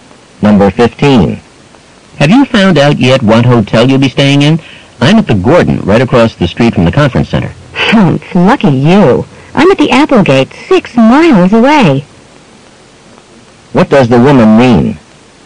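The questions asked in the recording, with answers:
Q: What does the woman mean?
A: Her hotel is inconveniently far from the conference center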